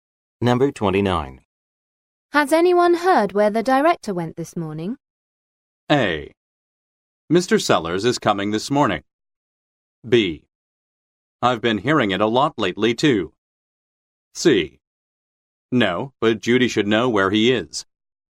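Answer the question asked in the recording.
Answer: C: No, but Judy should know where he is.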